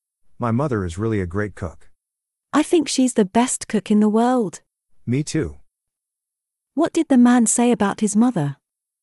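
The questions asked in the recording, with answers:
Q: What did the man say about his mother?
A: She is a great cook, the best in the world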